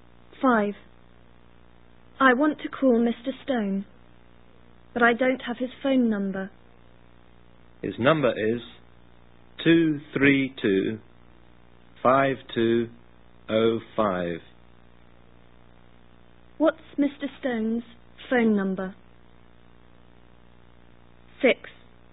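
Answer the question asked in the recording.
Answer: 232-5205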